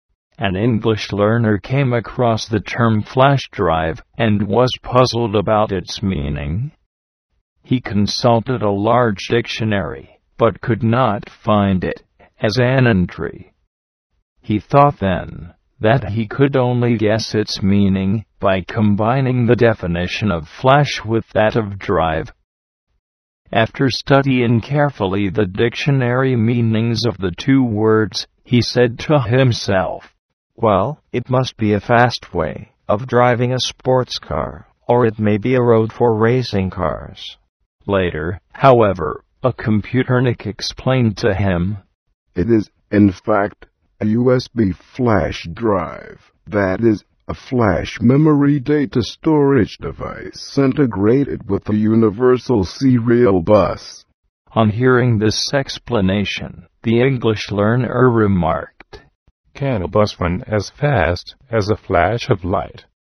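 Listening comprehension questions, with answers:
[复习填充]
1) Later, however, a computer___ explained to him:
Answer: nik

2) "Can a bus run as fast as a f____ of light?"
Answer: flash

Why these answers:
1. "computernik": 指精通计算机的计算机迷。

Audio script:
An English learner came across the term "flash drive" and was puzzled about its meaning. He consulted a large dictionary but could not find it as an entry. He thought, then, that he could only guess its meaning by combining the definition of "flash" with that of "drive." After studying carefully the dictionary meanings of the two words, he said to himself: "Well, it must be a fast way of driving a sports car, or it may be a road for racing cars." Later, however, a computernik explained to him: "It is, in fact, a USB flash drive, that is, a flash memory data storage device integrated with a universal serial bus." On hearing this explanation, the English learner remarked: "Can a bus run as fast as a flash of light?"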